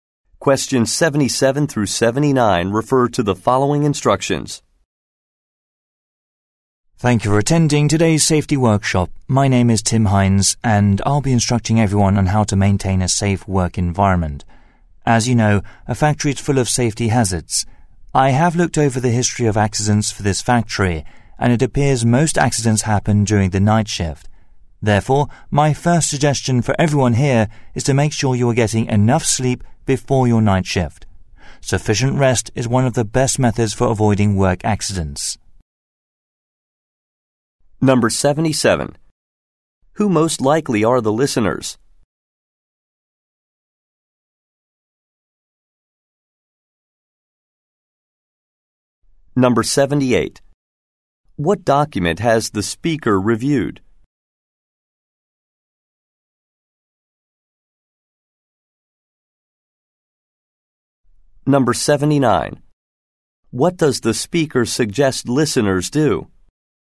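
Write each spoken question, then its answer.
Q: Who most likely are the listeners?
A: Factory workers

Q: What document has the speaker reviewed?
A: The factory's history of accidents

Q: What does the speaker suggest listeners do?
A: Get enough sleep before the night shift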